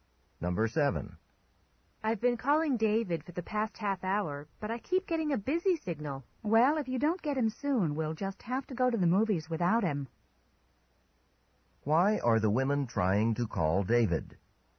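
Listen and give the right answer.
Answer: To invite him to the movies.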